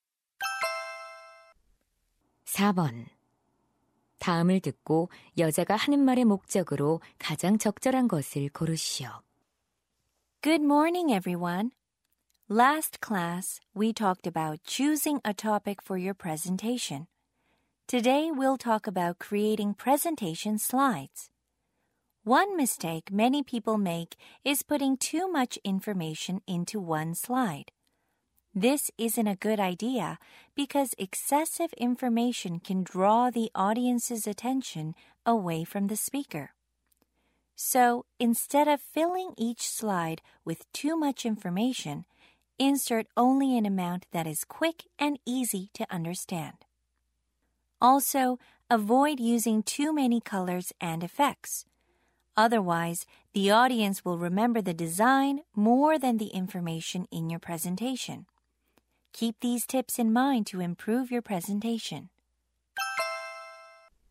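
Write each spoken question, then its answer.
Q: 다음을 듣고 여자가 하는 말의 목적으로 가장 적절한 것을 고르시오.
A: 발표 슬라이드 제작 요령을 알려주려고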